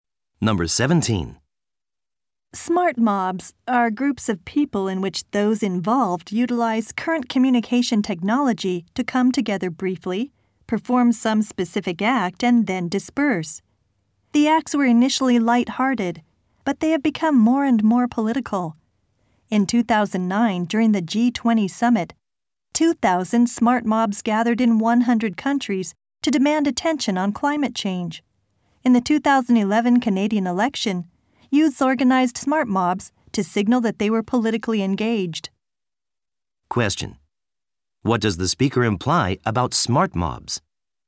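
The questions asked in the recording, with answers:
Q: What does the speaker imply about smart mobs?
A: They have become more political over time.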